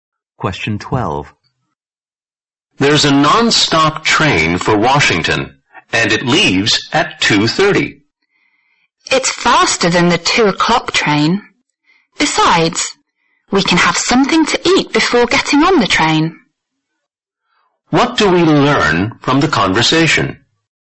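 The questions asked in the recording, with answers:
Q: What do we learn from the conversation?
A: They will take the 2:30 non-stop train, which is faster, and eat before boarding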